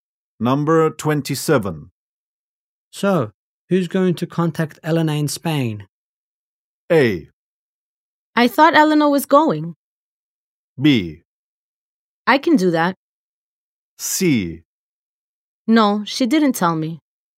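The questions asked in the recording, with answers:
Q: So, who's going to contact Elena in Spain?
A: B: I can do that.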